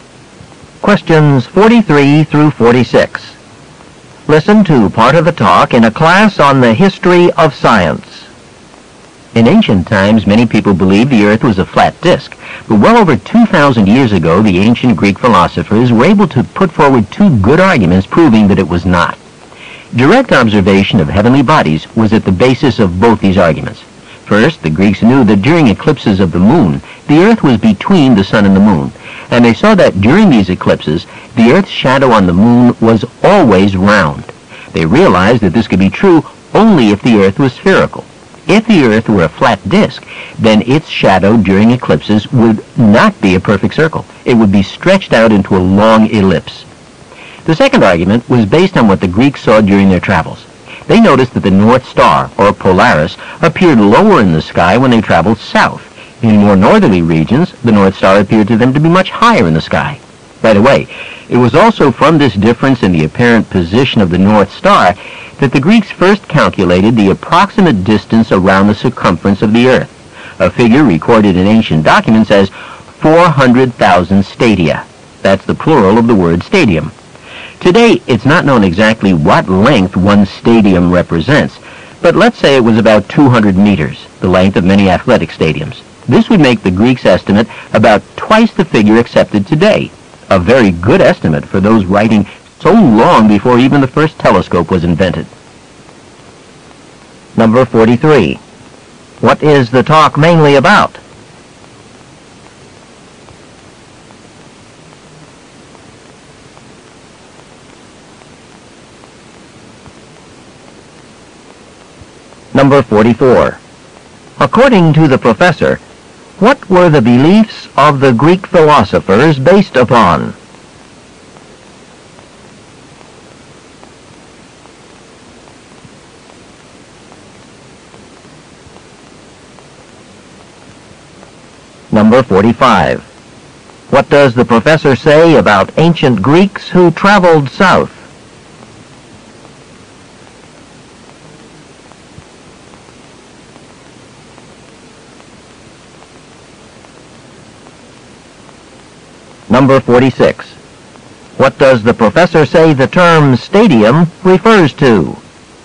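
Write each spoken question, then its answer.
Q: What is the talk mainly about?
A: How ancient Greeks showed the Earth is round

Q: According to the professor, what were the beliefs of the Greek philosophers based upon?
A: Direct observation of heavenly bodies

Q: What does the professor say about ancient Greeks who traveled south?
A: They saw the North Star lower in the sky

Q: What does the professor say the term stadium refers to?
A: An ancient unit of length, about 200 meters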